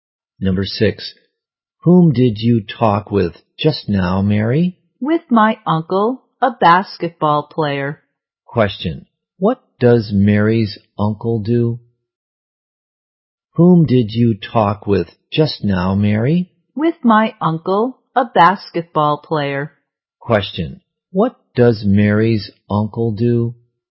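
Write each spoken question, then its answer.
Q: Question. What does Mary's uncle do?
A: He is a basketball player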